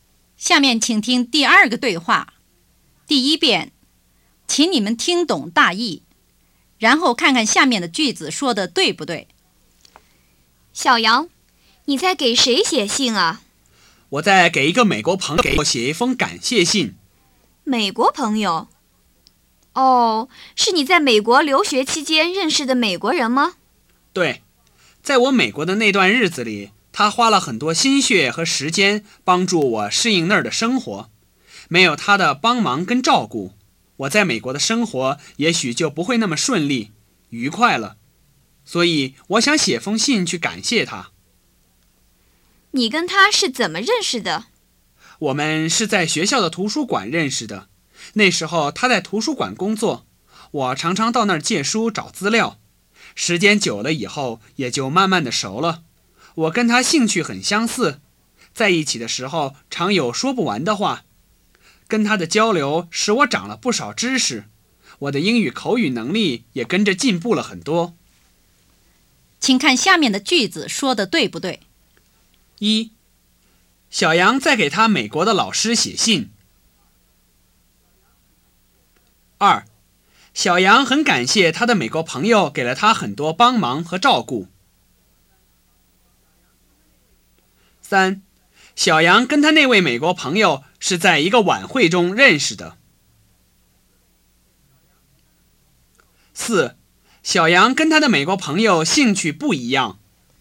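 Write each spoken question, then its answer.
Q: 小杨在给他美国的老师写信。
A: 不对

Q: 小杨跟他那位美国朋友是在一个晚会中认识的。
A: 不对

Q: 小杨跟他的美国朋友兴趣不一样。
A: 不对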